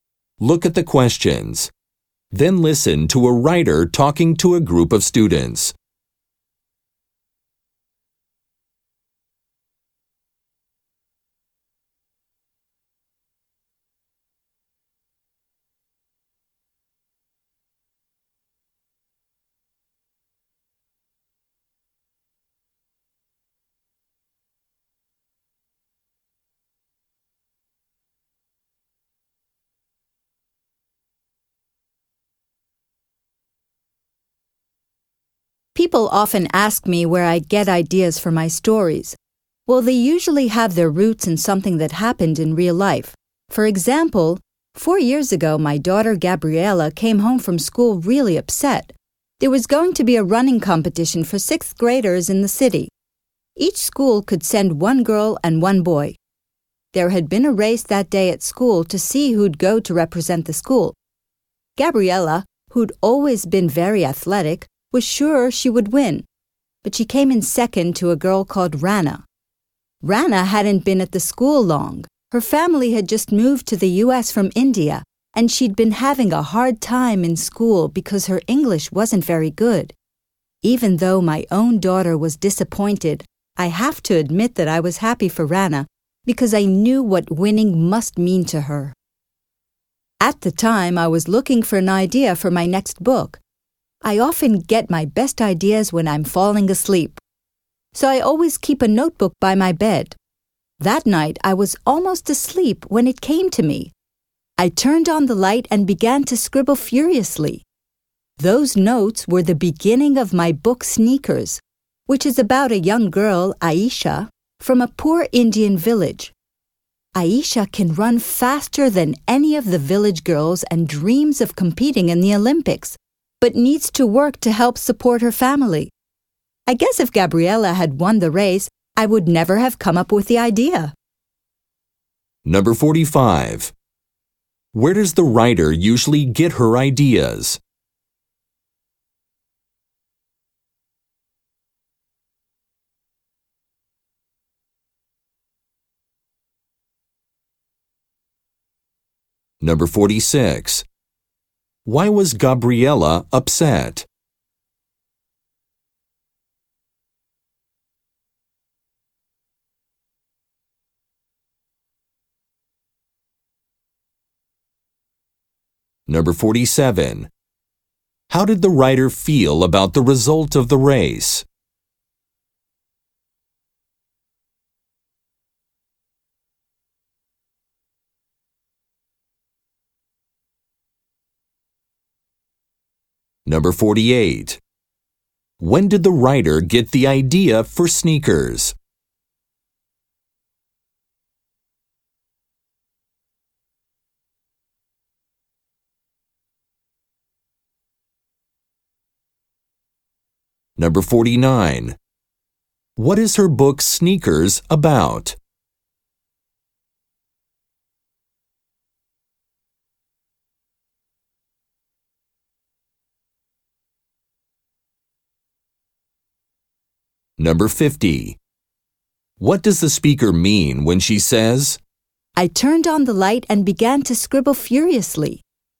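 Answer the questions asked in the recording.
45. From things that happened in real life
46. She came second in the school race and would not go to the competition
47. Happy for Rana, although her daughter was disappointed
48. At night when she was almost asleep
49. A poor Indian village girl who runs fast and dreams of the Olympics
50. She quickly wrote down her ideas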